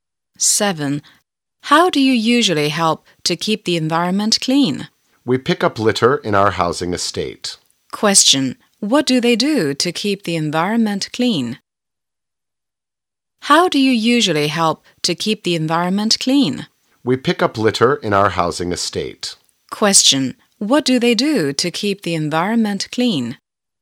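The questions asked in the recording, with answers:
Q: What do they do to keep the environment clean?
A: They pick up litter in their housing estate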